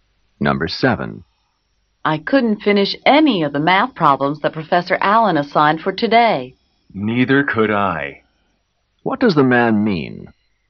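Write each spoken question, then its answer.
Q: What does the man mean?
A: He couldn't finish the math problems either.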